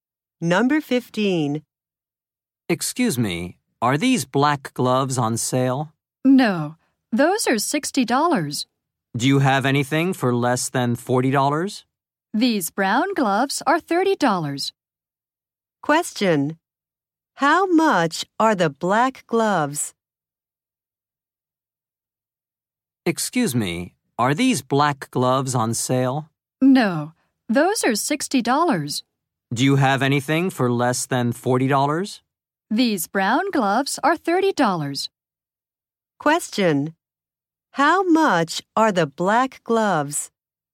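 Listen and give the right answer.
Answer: $60.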